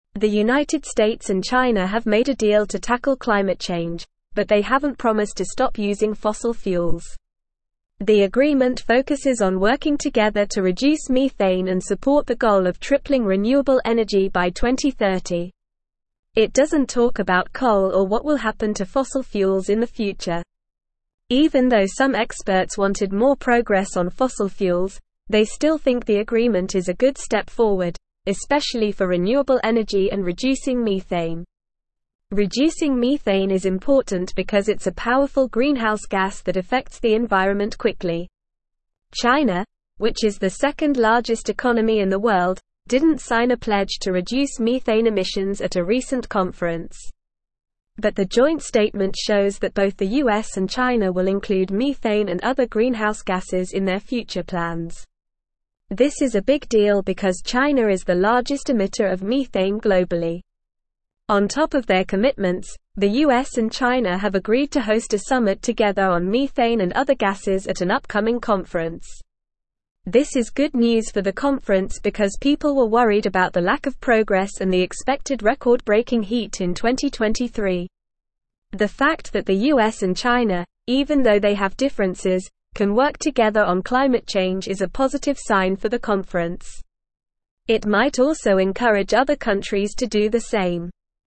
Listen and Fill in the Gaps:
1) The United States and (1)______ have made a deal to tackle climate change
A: China

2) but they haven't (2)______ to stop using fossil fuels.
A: promised

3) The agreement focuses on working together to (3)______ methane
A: reduce

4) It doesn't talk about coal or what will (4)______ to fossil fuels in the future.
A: happen

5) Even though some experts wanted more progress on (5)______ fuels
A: fossil

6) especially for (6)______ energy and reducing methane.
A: renewable

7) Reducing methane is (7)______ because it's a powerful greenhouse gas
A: important

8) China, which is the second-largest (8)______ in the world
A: economy

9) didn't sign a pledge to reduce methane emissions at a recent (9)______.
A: conference

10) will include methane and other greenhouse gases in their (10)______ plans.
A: future

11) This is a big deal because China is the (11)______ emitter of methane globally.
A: largest

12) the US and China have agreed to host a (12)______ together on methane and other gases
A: summit

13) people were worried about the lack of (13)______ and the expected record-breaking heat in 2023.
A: progress

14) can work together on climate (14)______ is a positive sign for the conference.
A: change

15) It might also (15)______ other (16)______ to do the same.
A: encourage

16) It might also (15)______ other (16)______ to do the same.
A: countries

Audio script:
The United States and China have made a deal to tackle climate change, but they haven't promised to stop using fossil fuels. The agreement focuses on working together to reduce methane and support the goal of tripling renewable energy by 2030. It doesn't talk about coal or what will happen to fossil fuels in the future. Even though some experts wanted more progress on fossil fuels, they still think the agreement is a good step forward, especially for renewable energy and reducing methane.
Reducing methane is important because it's a powerful greenhouse gas that affects the environment quickly. China, which is the second-largest economy in the world, didn't sign a pledge to reduce methane emissions at a recent conference. But the joint statement shows that both the US and China will include methane and other greenhouse gases in their future plans. This is a big deal because China is the largest emitter of methane globally.
On top of their commitments, the US and China have agreed to host a summit together on methane and other gases at an upcoming conference. This is good news for the conference because people were worried about the lack of progress and the expected record-breaking heat in 2023. The fact that the US and China, even though they have differences, can work together on climate change is a positive sign for the conference. It might also encourage other countries to do the same.

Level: Level 3